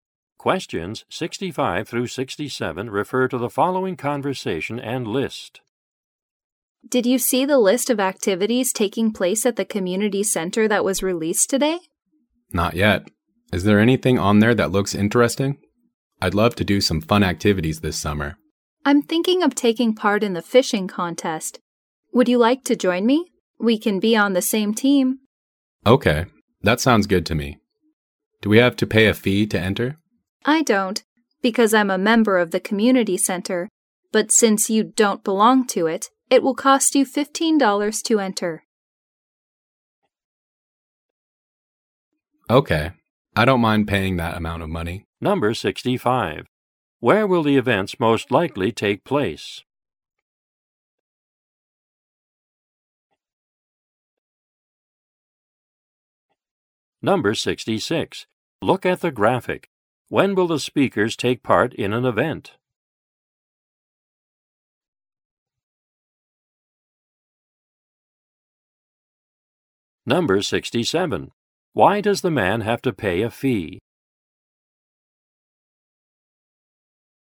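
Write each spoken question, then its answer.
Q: Where will the events most likely take place?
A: At the community center

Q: Why does the man have to pay a fee?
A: He isn't a member of the community center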